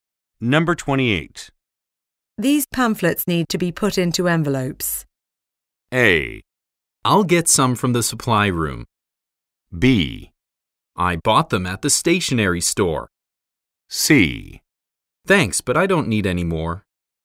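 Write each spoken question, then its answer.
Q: These pamphlets need to be put into envelopes.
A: A: I'll get some from the supply room.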